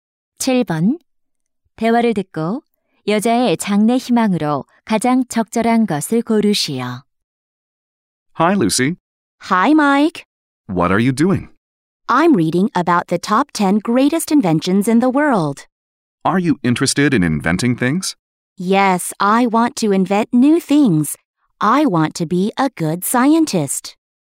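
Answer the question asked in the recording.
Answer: 과학자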